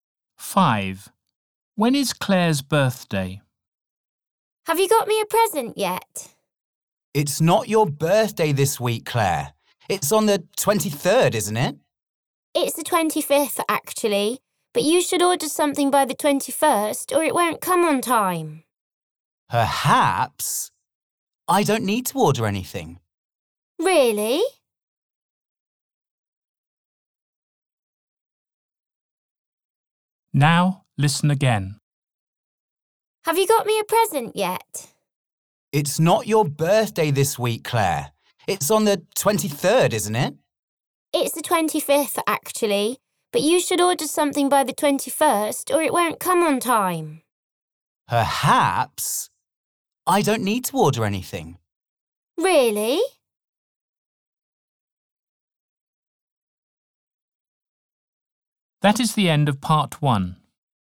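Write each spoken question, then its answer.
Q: When is Claire's birthday?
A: The 25th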